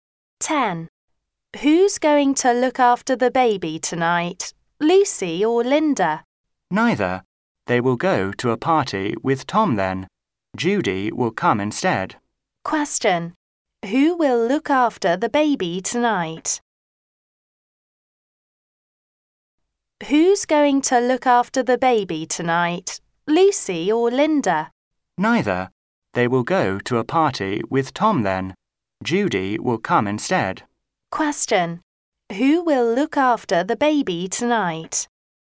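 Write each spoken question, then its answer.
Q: Question. Who will look after the baby tonight?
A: Judy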